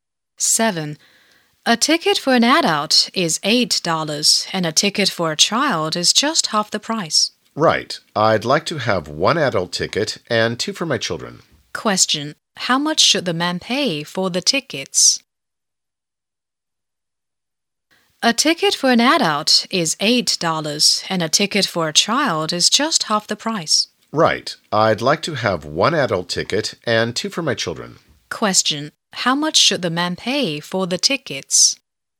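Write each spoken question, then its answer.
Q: How much should the man pay for the tickets?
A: $16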